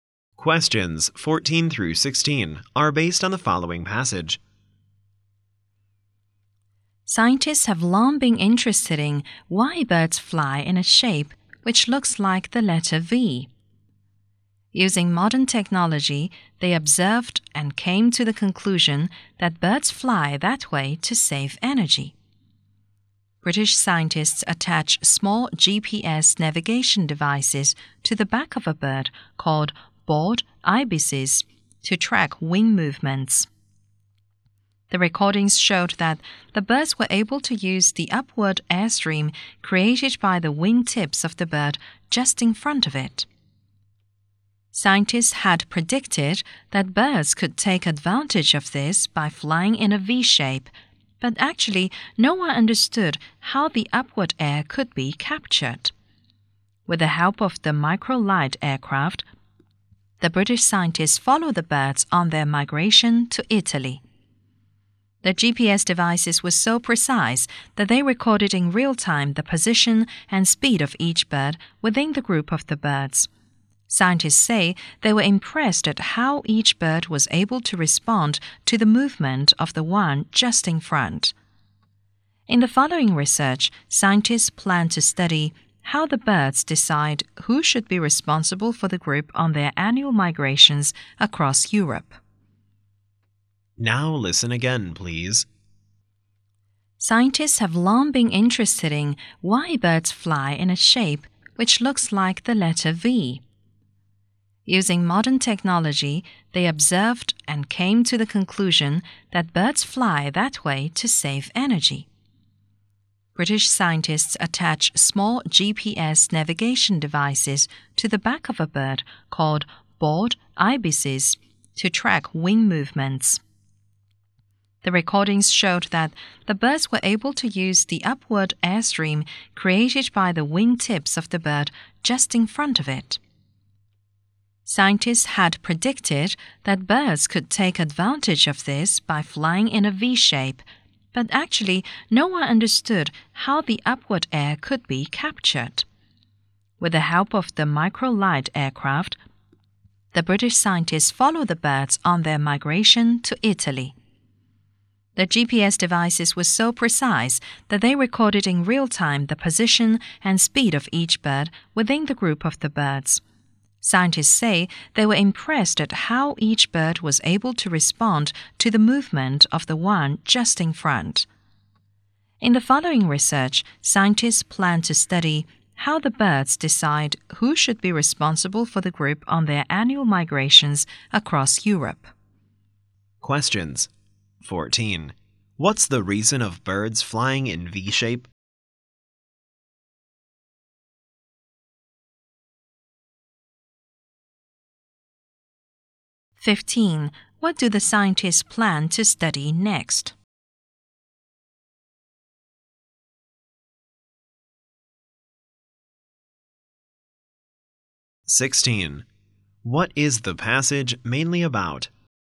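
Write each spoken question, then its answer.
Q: What's the reason of birds flying in V-shape?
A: To save energy

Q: What do the scientists plan to study next?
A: How birds decide who leads the group

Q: What is the passage mainly about?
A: Why birds fly in a V shape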